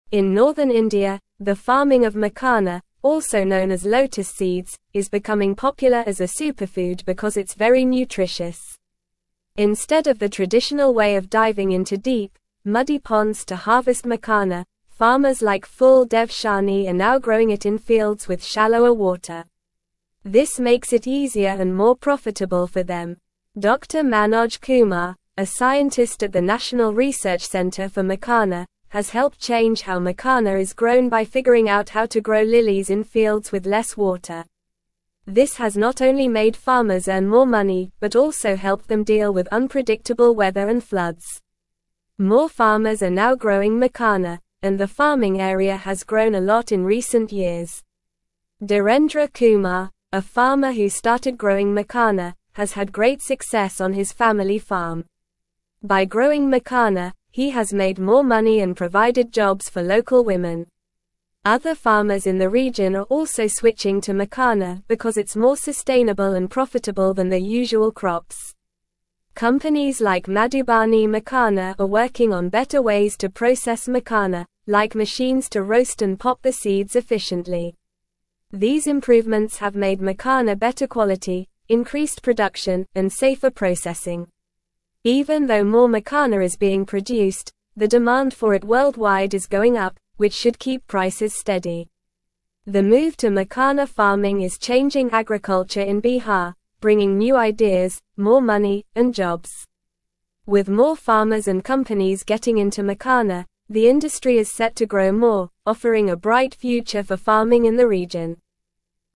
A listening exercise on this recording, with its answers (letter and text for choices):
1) What is makhana also known as?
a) Sunflower seeds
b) Lotus seeds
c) Pumpkin seeds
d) Chia seeds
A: b) Lotus seeds

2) How are farmers in northern India now growing makhana?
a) In deep, muddy ponds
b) In dry, arid land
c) In high mountains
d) In fields with shallower water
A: d) In fields with shallower water

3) Who is the scientist at the National Research Centre for Makhana?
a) Dr. Manoj Kumar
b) Dr. Sarah Smith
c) Dr. John Johnson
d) Dr. Emily Brown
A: a) Dr. Manoj Kumar

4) What has helped farmers deal with unpredictable weather and floods?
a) Using more pesticides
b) Planting more trees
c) Growing lilies in fields with less water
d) Building taller fences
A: c) Growing lilies in fields with less water

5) What has makhana farming provided for local women?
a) Free seeds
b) Jobs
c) Cooking classes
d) Clothing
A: b) Jobs

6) What are companies like Madhubani Makhana working on?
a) Growing more flowers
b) Making pottery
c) Better ways to process makhana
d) Building houses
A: c) Better ways to process makhana

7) What has the improvements in processing makhana led to?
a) Decreased production and lower quality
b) No change in quality or production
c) More expensive seeds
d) Better quality and increased production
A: d) Better quality and increased production

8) What is the impact of the move to makhana farming in Bihar?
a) Bringing new ideas, more money, and jobs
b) Decreasing job opportunities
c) Causing a decrease in crop yield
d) No change in the agriculture industry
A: a) Bringing new ideas, more money, and jobs

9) Instead of the traditional way of diving into deep, muddy (1)______ to harvest makhana, farmers like Phool dev Shahni are now (2)______ it in fields with shallower (3)______.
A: ponds

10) Instead of the traditional way of diving into deep, muddy (1)______ to harvest makhana, farmers like Phool dev Shahni are now (2)______ it in fields with shallower (3)______.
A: growing

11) Instead of the traditional way of diving into deep, muddy (1)______ to harvest makhana, farmers like Phool dev Shahni are now (2)______ it in fields with shallower (3)______.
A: water

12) Dr. Manoj Kumar, a (4)______ at the National Research Centre for Makhana, has helped (5)______ how makhana is grown by (6)______ out how to grow lilies in fields with less water.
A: scientist

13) Dr. Manoj Kumar, a (4)______ at the National Research Centre for Makhana, has helped (5)______ how makhana is grown by (6)______ out how to grow lilies in fields with less water.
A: change

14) Dr. Manoj Kumar, a (4)______ at the National Research Centre for Makhana, has helped (5)______ how makhana is grown by (6)______ out how to grow lilies in fields with less water.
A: figuring

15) This has not only made (7)______s earn more (8)______ but also helped them deal with unpredictable weather and floods.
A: farmer

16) This has not only made (7)______s earn more (8)______ but also helped them deal with unpredictable weather and floods.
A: money

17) By growing makhana, he has made more money and provided jobs for local (9)______.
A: women

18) (10)______ farmers in the region are also switching to makhana because it's more (11)______ and profitable than their usual (12)______.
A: Other

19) (10)______ farmers in the region are also switching to makhana because it's more (11)______ and profitable than their usual (12)______.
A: sustainable

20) (10)______ farmers in the region are also switching to makhana because it's more (11)______ and profitable than their usual (12)______.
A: crops

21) These improvements have made makhana better quality, increased production, and (13)______ processing.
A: safer

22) Even though more (14)______ is being produced, the (15)______ for it worldwide is going up, which should keep prices steady.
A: makhana

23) Even though more (14)______ is being produced, the (15)______ for it worldwide is going up, which should keep prices steady.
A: demand

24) The move to makhana farming is (16)______ agriculture in Bihar, bringing new ideas, more money, and jobs.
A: changing

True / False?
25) Dr. Manoj Kumar, a scientist, hindered change how makhana is grown by figuring out how to grow lilies in fields with less water.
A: False

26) The shift to makhana farming is bringing old ideas, less money, and jobs to agriculture in Bihar, with the industry expected to decline further.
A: False

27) Despite the increase in makhana production, the worldwide demand for it is rising, which should keep prices stable.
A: True

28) The changes in growing makhana have made farmers earn less money and cope worse with predictable weather and floods.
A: False

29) Farmers in northern India are growing makhana, also known as lotus seeds, in fields with shallower water instead of deep, muddy ponds.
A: True

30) The improvements in makhana processing have increased production and made the quality better.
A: True

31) Dhirendra Kumar, a farmer, has been successful in growing makhana on his family farm, providing jobs for local women.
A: True

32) Companies like Madhubani Makhana are worsening the processing of makhana with machines for roasting and popping the seeds efficiently.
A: False

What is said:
In northern India, the farming of makhana, also known as lotus seeds, is becoming popular as a superfood because it's very nutritious. Instead of the traditional way of diving into deep, muddy ponds to harvest makhana, farmers like Phool dev Shahni are now growing it in fields with shallower water. This makes it easier and more profitable for them.
Dr. Manoj Kumar, a scientist at the National Research Centre for Makhana, has helped change how makhana is grown by figuring out how to grow lilies in fields with less water. This has not only made farmers earn more money but also helped them deal with unpredictable weather and floods. More farmers are now growing makhana, and the farming area has grown a lot in recent years.
Dhirendra Kumar, a farmer who started growing makhana, has had great success on his family farm. By growing makhana, he has made more money and provided jobs for local women. Other farmers in the region are also switching to makhana because it's more sustainable and profitable than their usual crops.
Companies like Madhubani Makhana are working on better ways to process makhana, like machines to roast and pop the seeds efficiently. These improvements have made makhana better quality, increased production, and safer processing. Even though more makhana is being produced, the demand for it worldwide is going up, which should keep prices steady. The move to makhana farming is changing agriculture in Bihar, bringing new ideas, more money, and jobs. With more farmers and companies getting into makhana, the industry is set to grow more, offering a bright future for farming in the region.